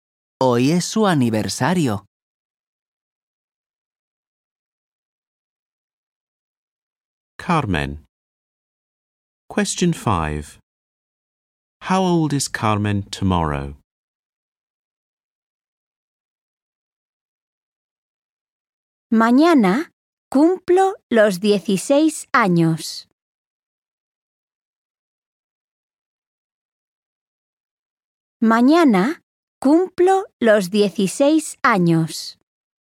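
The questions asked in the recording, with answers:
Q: How old is Carmen tomorrow?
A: 16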